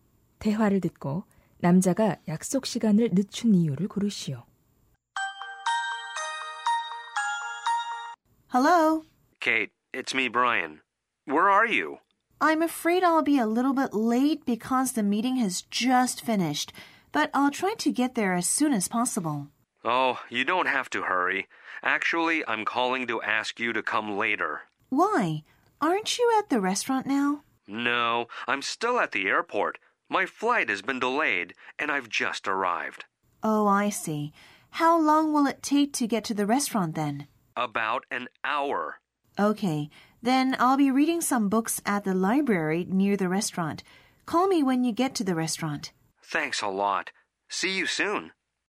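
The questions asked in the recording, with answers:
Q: 대화를 듣고 남자가 약속 시간을 늦춘 이유를 고르시오.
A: 비행기가 지연되어서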